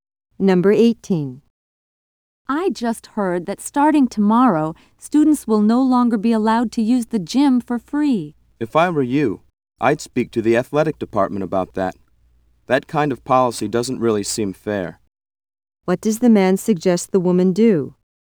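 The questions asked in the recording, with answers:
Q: What does the man suggest the woman do?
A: Talk to the athletic department.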